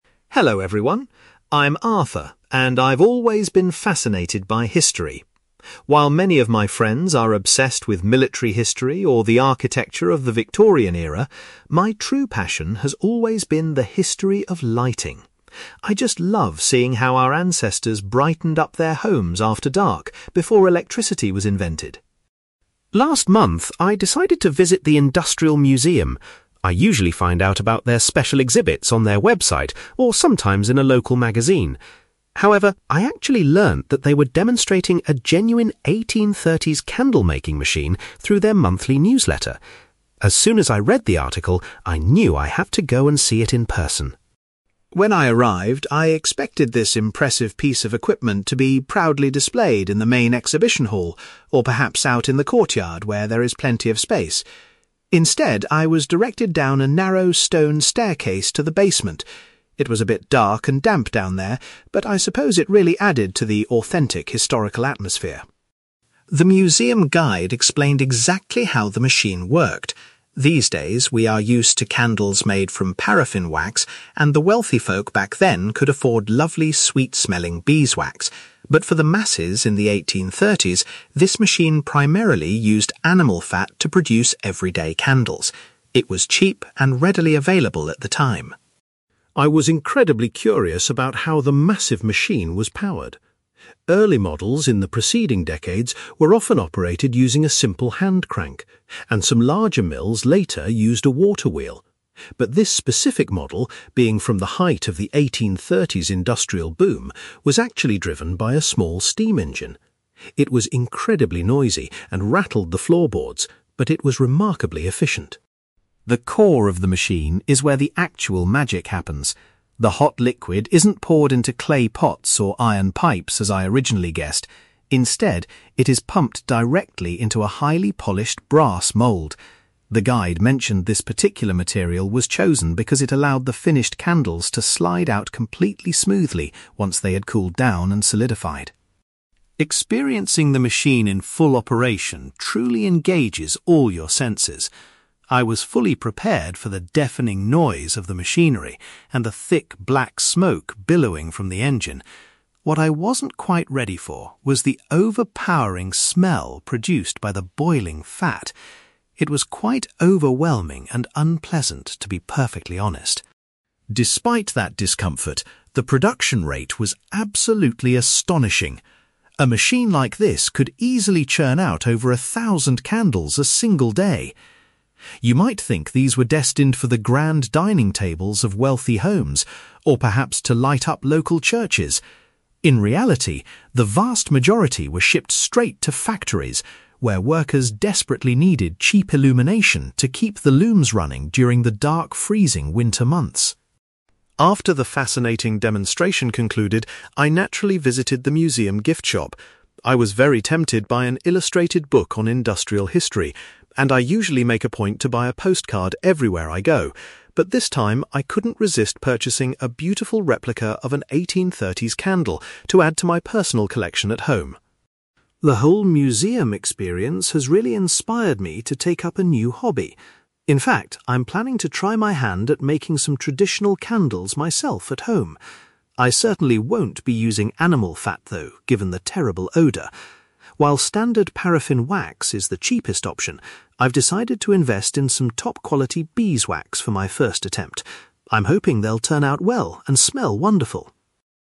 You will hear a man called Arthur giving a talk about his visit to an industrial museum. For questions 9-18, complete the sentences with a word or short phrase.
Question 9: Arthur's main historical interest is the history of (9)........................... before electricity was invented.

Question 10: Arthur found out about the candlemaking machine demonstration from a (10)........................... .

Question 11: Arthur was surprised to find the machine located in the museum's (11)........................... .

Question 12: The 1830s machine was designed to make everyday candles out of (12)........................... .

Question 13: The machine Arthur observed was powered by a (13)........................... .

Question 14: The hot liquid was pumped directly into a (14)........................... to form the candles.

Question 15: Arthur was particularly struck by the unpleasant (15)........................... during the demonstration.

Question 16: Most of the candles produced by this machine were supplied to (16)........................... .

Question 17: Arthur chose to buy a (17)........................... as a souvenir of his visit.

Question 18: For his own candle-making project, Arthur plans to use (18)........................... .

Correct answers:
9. lighting
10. newsletter
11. basement
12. animal fat
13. steam engine
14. brass mould
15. smell
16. factories
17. replica
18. beeswax

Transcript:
Arthur: Hello everyone. I'm Arthur, and I've always been fascinated by history. While many of my friends are obsessed with military history or the architecture of the Victorian era, my true passion has always been the history of lighting. I just love seeing how our ancestors brightened up their homes after dark before electricity was invented.
Last month, I decided to visit the Industrial Museum. I usually find out about their special exhibits on their website, or sometimes in a local magazine. However, I actually learned that they were demonstrating a genuine 1830s candlemaking machine through their monthly newsletter. As soon as I read the article, I knew I had to go and see it in person.
When I arrived, I expected this impressive piece of equipment to be proudly displayed in the main exhibition hall, or perhaps out in the courtyard where there is plenty of space. Instead, I was directed down a narrow stone staircase to the basement. It was a bit dark and damp down there, but I suppose it really added to the authentic historical atmosphere.
The museum guide explained exactly how the machine worked. These days we are used to candles made from paraffin wax, and the wealthy folk back then could afford lovely sweet-smelling beeswax. But for the masses in the 1830s, this machine primarily used animal fat to produce everyday candles. It was cheap and readily available at the time.
I was incredibly curious about how the massive machine was powered. Early models in the preceding decades were often operated using a simple hand crank, and some larger mills later used a water wheel. But this specific model, being from the height of the 1830s industrial boom, was actually driven by a small steam engine. It was incredibly noisy and rattled the floorboards, but it was remarkably efficient.
The core of the machine is where the actual magic happens. The hot liquid isn't poured into clay pots or iron pipes as I originally guessed. Instead, it is pumped directly into a highly polished brass mould. The guide mentioned this particular material was chosen because it allowed the finished candles to slide out completely smoothly once they had cooled down and solidified.
Experiencing the machine in full operation truly engages all your senses. I was fully prepared for the deafening noise of the machinery, and the thick black smoke billowing from the engine. What I wasn't quite ready for was the overpowering smell produced by the boiling fat! It was quite overwhelming and unpleasant, to be perfectly honest.
Despite that discomfort, the production rate was absolutely astonishing. A machine like this could easily churn out over a thousand candles a single day. You might think these were destined for the grand dining tables of wealthy homes or perhaps to light up local churches. In reality, the vast majority were shipped straight to factories, where workers desperately needed cheap illumination to keep the looms running during the dark, freezing winter months.
After the fascinating demonstration concluded, I naturally visited the museum gift shop. I was very tempted by an illustrated book on industrial history, and I usually make a point to buy a postcard everywhere I go. But this time, I couldn't resist purchasing a beautiful replica of an 1830s candle to add to my personal collection at home.
The whole museum experience has really inspired me to take up a new hobby. In fact, I'm planning to try my hand at making some traditional candles myself at home. I certainly won't be using animal fat, though, given the terrible odour! While standard paraffin wax is the cheapest option, I've decided to invest in some top-quality beeswax for my first attempt. I'm hoping they'll turn out well and smell wonderful!

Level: B2